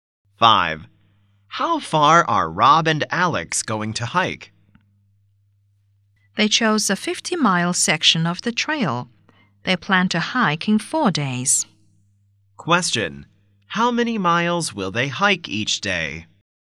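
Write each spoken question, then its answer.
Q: How many miles will they hike each day?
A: 12.5 miles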